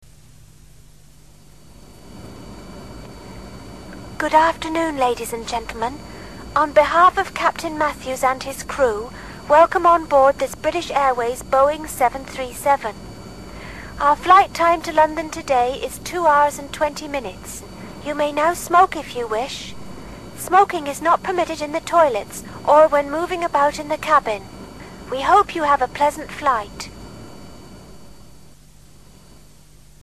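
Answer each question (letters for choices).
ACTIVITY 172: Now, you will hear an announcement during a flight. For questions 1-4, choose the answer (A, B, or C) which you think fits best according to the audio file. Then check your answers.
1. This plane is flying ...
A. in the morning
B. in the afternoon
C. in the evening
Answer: B

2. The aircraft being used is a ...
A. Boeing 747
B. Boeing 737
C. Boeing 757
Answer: B

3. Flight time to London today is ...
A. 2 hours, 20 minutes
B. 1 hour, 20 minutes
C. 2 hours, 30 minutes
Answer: A

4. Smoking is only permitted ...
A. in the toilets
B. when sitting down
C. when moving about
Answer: B

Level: Curso First Certificate Exam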